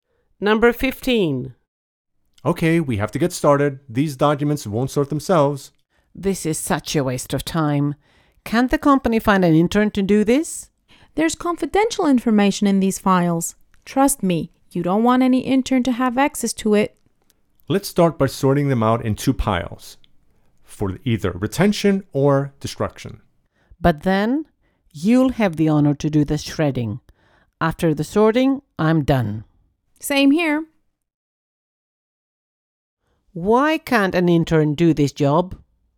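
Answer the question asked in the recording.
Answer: The files contain confidential information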